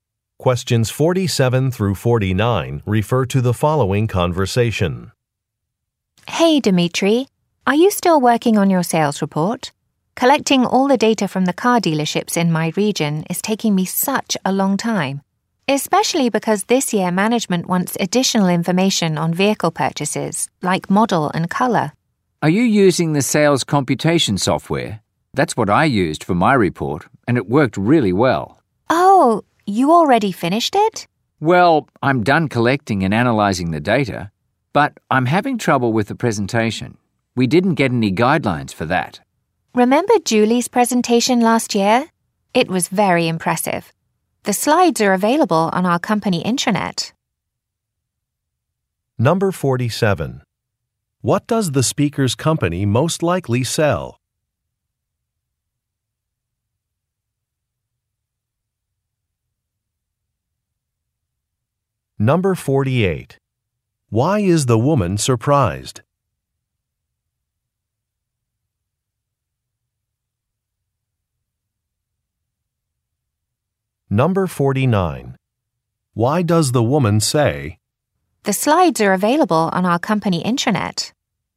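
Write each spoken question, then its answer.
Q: What does the speaker's company most likely sell?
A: Cars

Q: Why does the woman say,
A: To suggest using Julie's presentation as a model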